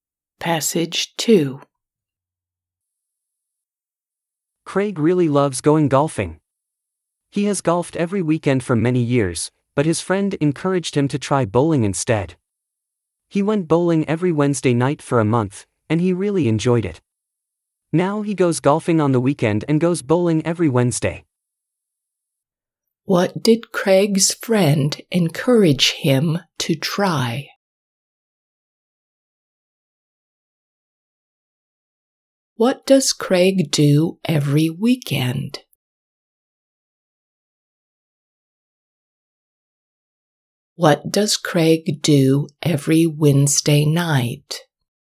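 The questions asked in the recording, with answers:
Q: What did Craig's friend encourage him to try?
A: bowling

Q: What does Craig do every weekend?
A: goes golfing

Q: What does Craig do every Wednesday night?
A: goes bowling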